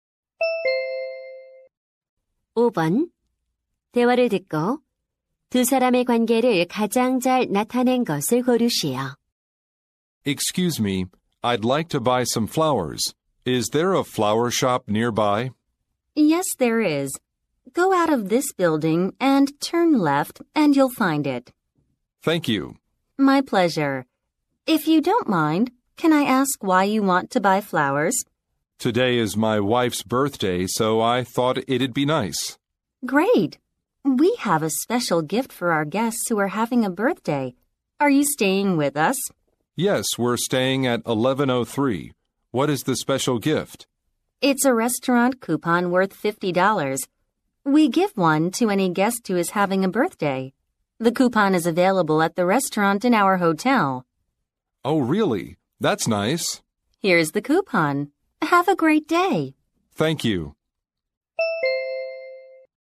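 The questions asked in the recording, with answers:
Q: 대화를 듣고 두 사람의 관계를 가장 잘 나타낸 것을 고르시오.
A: 호텔 직원 – 투숙객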